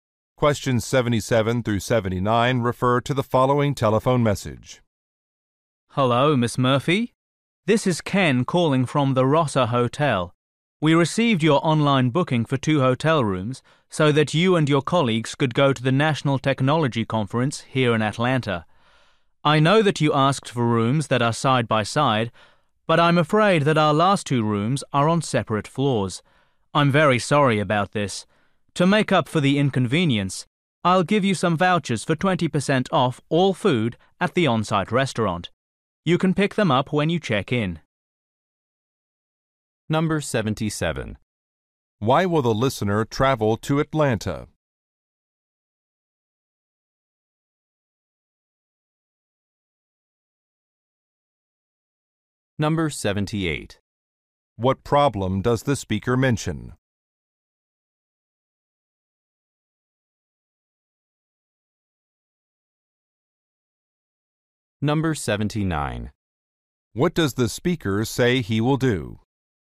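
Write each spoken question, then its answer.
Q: Why will the listener travel to Atlanta?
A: To attend a technology conference

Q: What problem does the speaker mention?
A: The rooms are not next to each other

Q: What does the speaker say he will do?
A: Give restaurant discount vouchers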